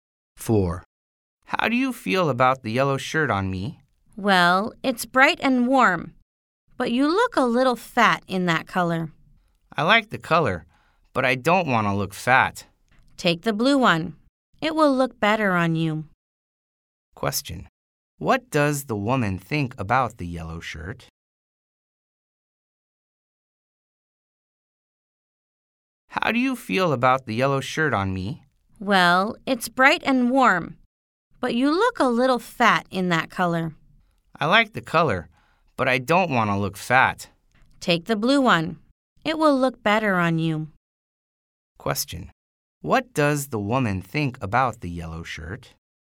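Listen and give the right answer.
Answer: It's bright and warm but makes him look a little fat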